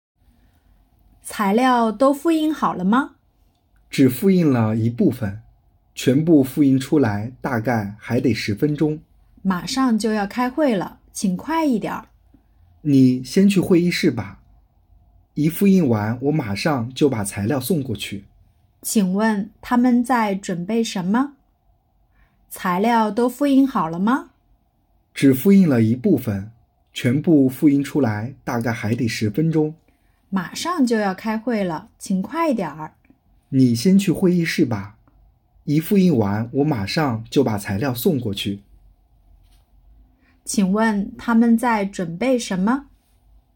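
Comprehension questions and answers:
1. 他们在准备什么?- Tāmen zài zhǔnbèi shénme?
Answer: 开会的材料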